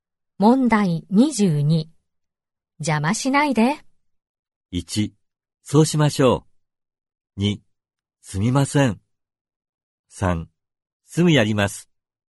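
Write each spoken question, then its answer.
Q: 邪魔しないで。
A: 2: すみません。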